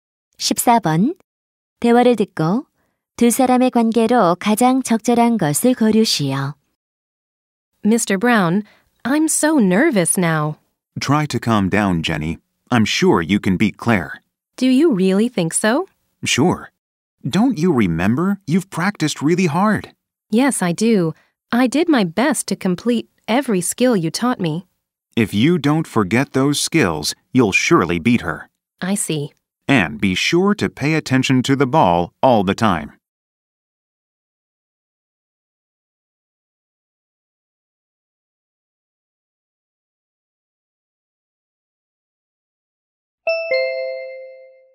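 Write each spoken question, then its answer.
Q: 대화를 듣고 두 사람의 관계로 가장 적절한 것을 고르시오.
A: 코치와 선수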